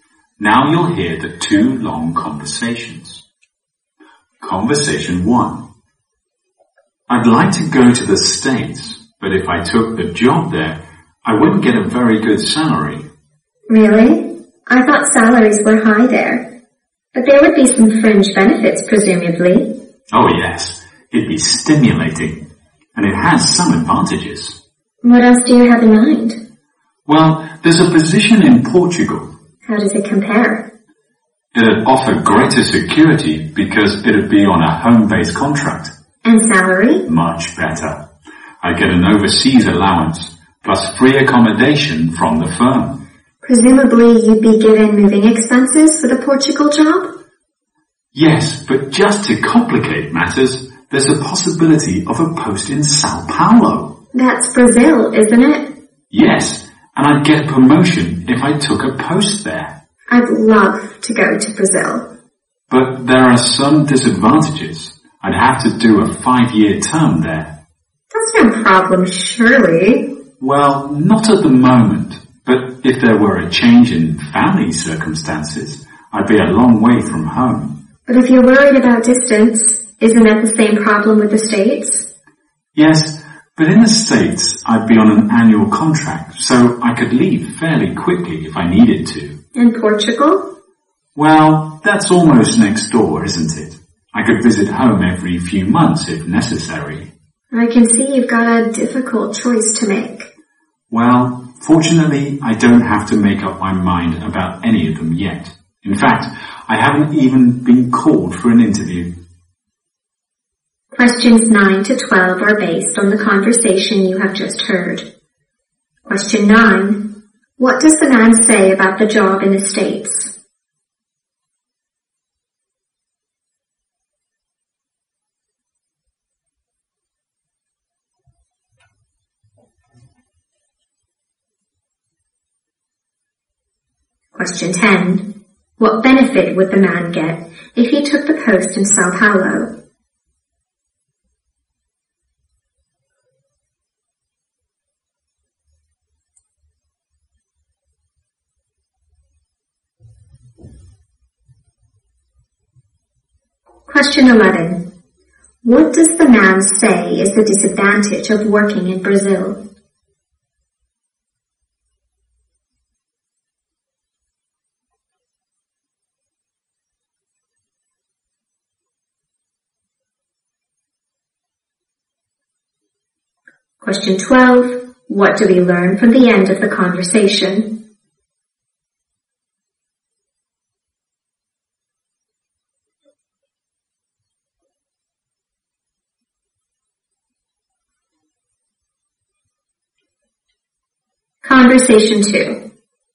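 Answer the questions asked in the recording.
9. The pay would not be very good, but the job would be stimulating.
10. A promotion
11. He would have to stay for a 5-year term, far from home.
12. He has not even been called for an interview yet.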